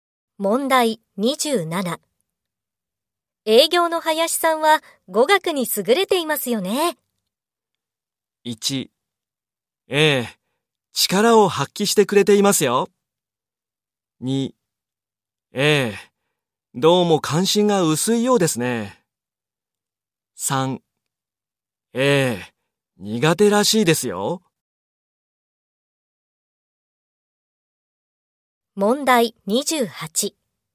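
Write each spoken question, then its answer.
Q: 営業の林さんは語学に優れていますよね。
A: 1: ええ、力を発揮してくれていますよ。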